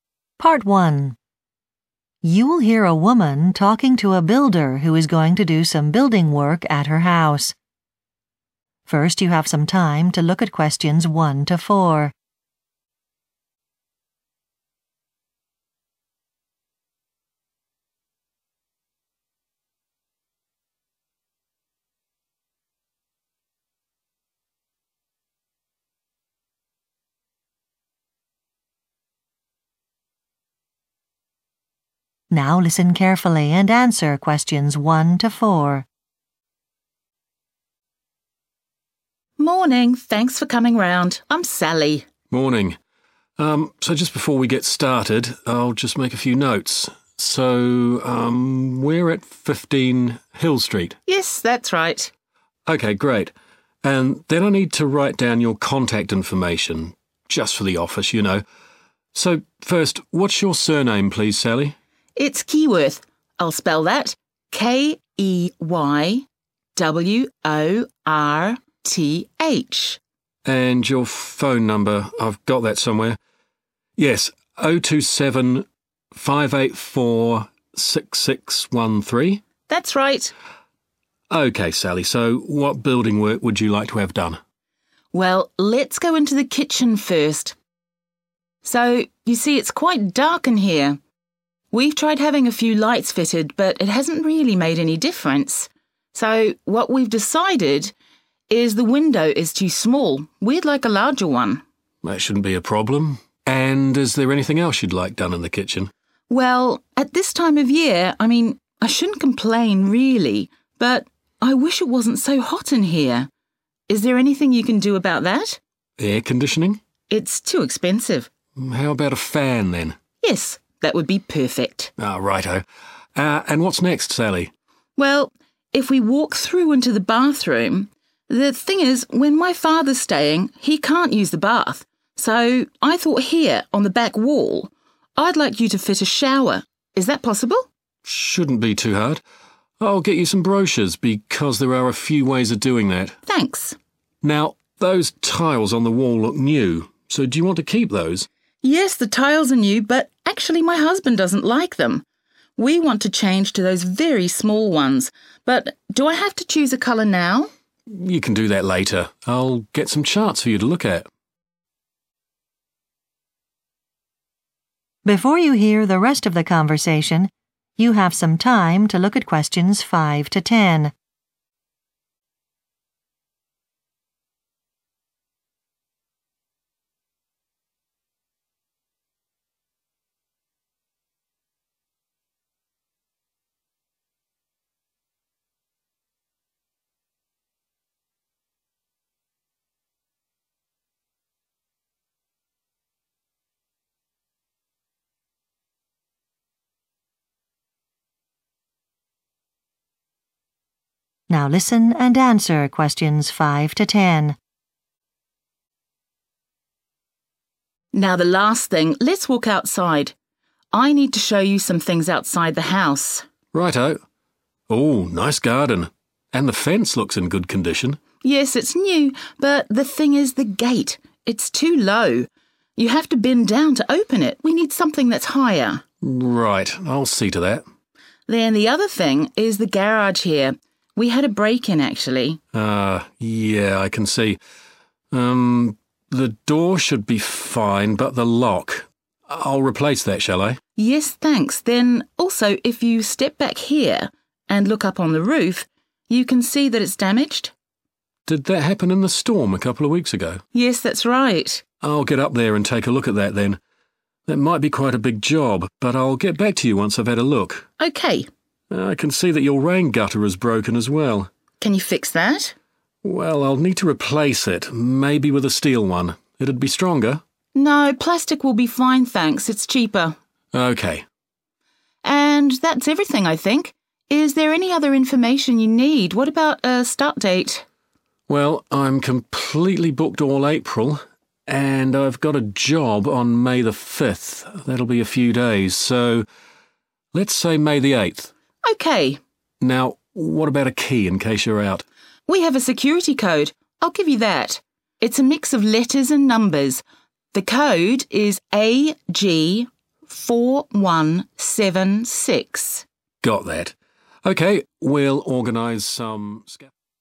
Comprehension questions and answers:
Complete the notes below. Write ONE WORD AND/OR A NUMBER for each answer.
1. Name: Sally 1 .....................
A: keyworth

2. The kitchen is too hot - fit a 2 ..................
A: fan

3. put in a 3 .................on the back wall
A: shower

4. decide the 4 ................ of the small tiles later.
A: color

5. put a higher 5 ...............in the garden.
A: gate

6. put a new 6 ................ on the garage door.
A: lock

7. fix the roof - it was damaged by a 7 .....................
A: storm

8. fit a new rain gutter made of 8 .....................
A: plastic

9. Start date: 9 .....................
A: 8th May

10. Security code: 10 .................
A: AG4176